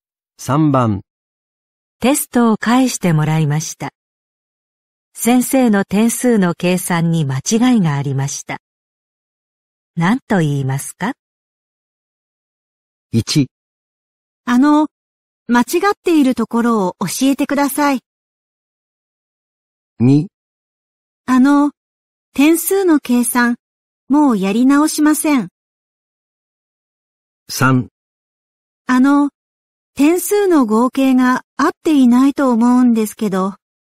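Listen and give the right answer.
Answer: 3: 点数の合計が合っていないと思うんですけど。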